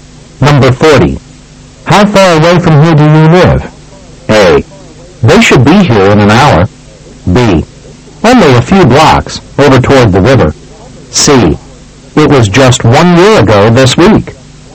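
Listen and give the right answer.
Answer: B: Only a few blocks, over toward the river.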